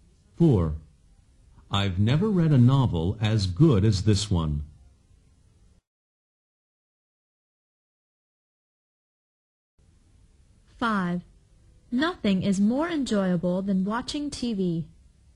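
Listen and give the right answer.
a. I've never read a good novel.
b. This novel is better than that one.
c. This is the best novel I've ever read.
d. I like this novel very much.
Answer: c. This is the best novel I've ever read.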